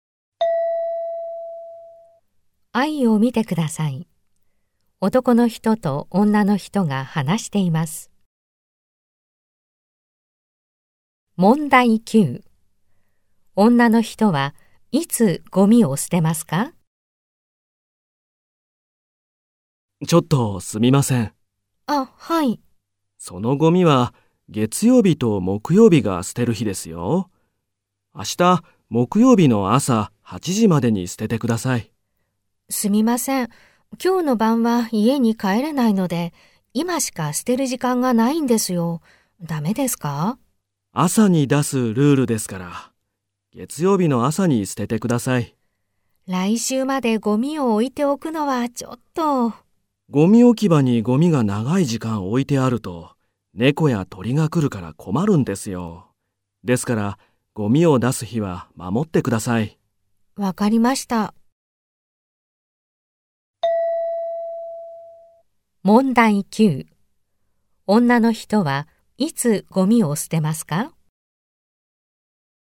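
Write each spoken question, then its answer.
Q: 女の人はいつゴミを捨てますか?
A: 月曜日の朝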